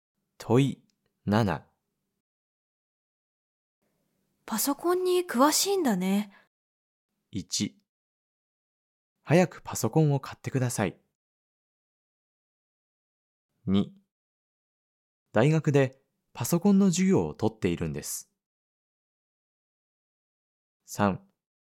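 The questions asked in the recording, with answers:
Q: パソコンに詳しいんだね。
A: 2: 大学でパソコンの授業を取っているんです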